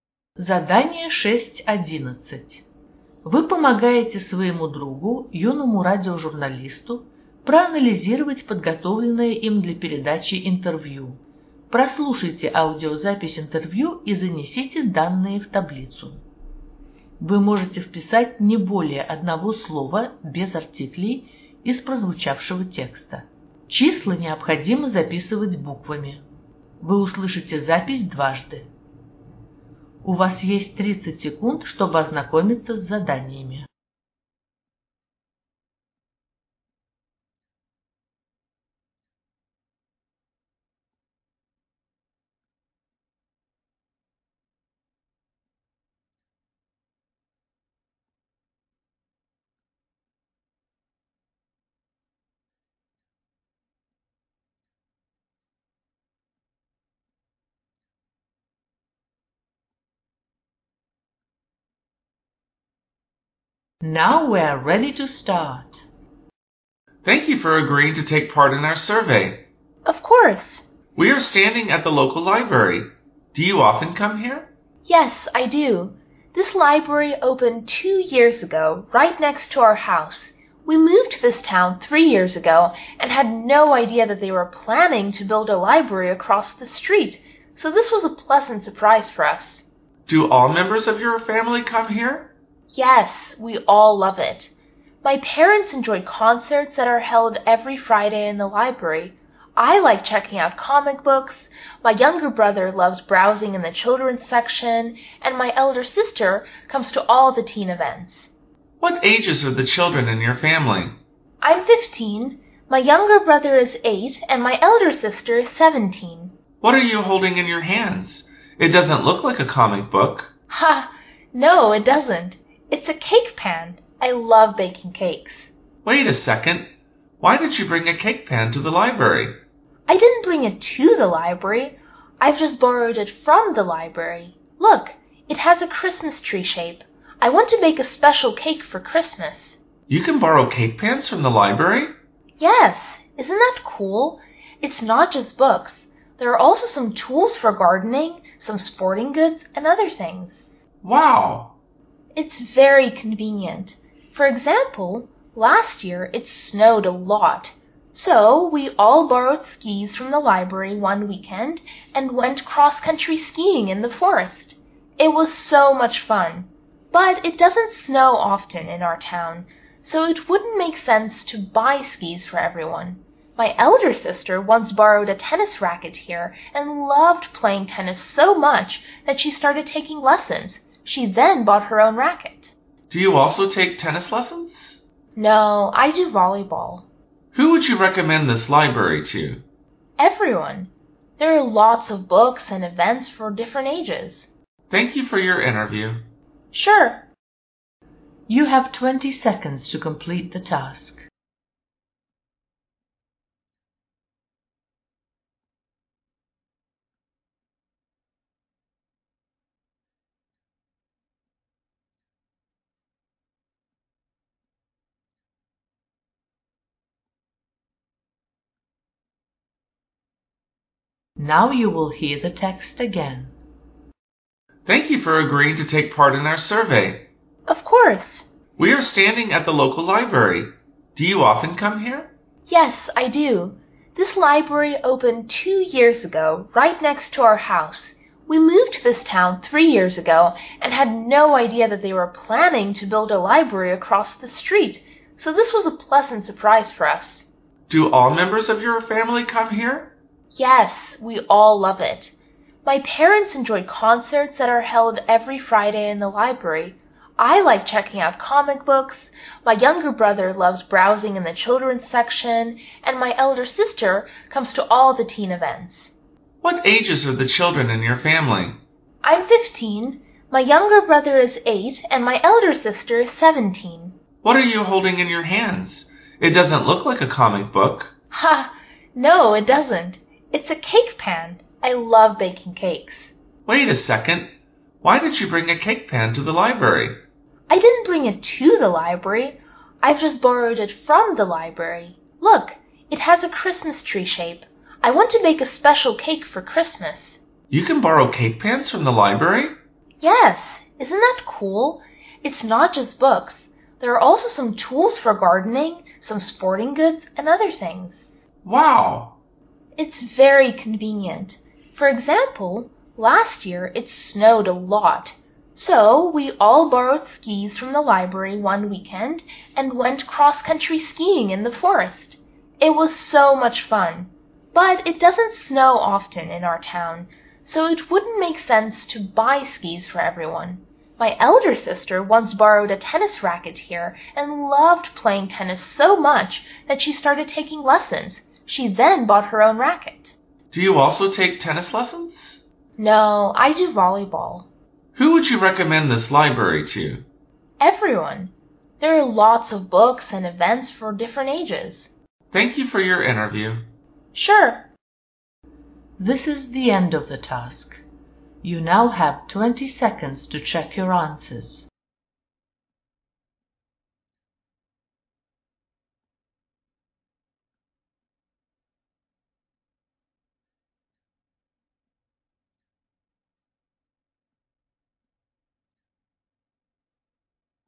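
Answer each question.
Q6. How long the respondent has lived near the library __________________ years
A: three

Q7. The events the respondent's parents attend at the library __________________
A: concerts

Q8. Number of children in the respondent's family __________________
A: three

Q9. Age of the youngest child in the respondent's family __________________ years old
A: eight

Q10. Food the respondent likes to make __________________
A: cakes

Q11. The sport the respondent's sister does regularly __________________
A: tennis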